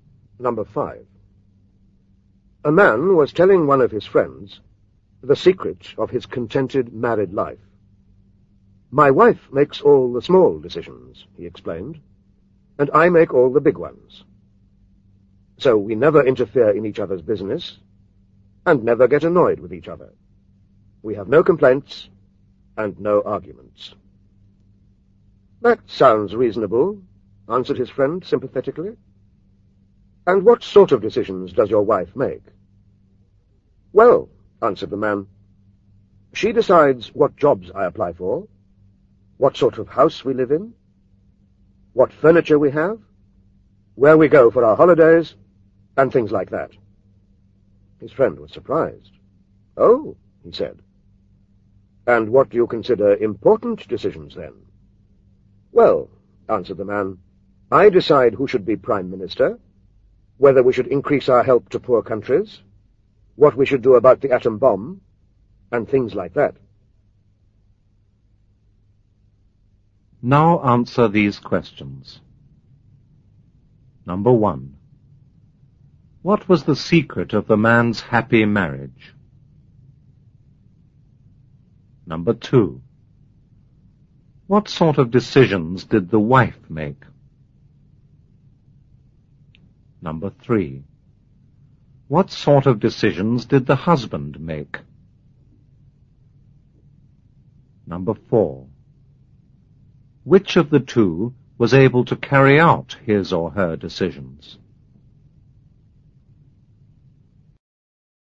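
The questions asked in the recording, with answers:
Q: What was the secret of the man's happy marriage?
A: His wife made all the small decisions and he made all the big ones

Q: What sort of decisions did the wife make?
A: What jobs he applied for, what house they lived in, what furniture they had, where they went for holidays

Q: What sort of decisions did the husband make?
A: Who should be Prime Minister, whether to increase help to poor countries, what to do about the atom bomb

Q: Which of the two was able to carry out his or her decisions?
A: The wife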